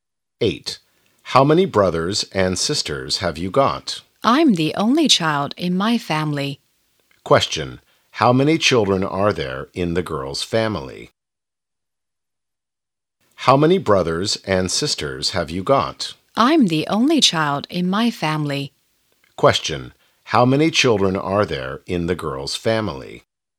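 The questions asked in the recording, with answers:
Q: Question, how many children are there in the girl's family?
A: One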